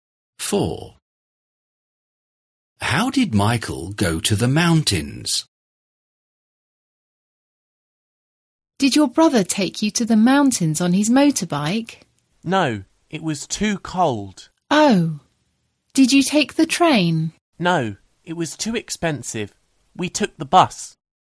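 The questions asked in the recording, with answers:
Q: How did Michael go to the mountains?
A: by bus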